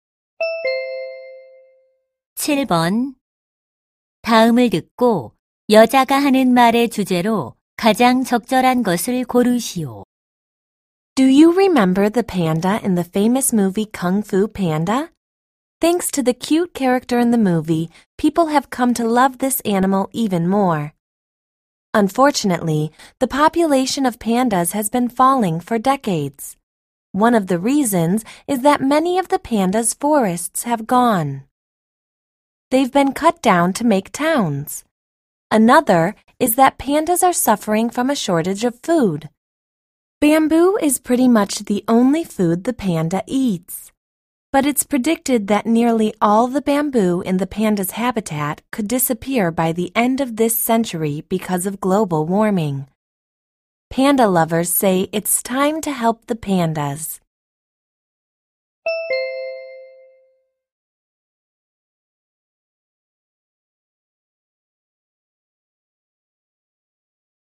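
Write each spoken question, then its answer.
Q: 다음을 듣고 여자가 하는 말의 주제로 가장 적절한 것을 고르시오.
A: 판다 개체 수 감소의 원인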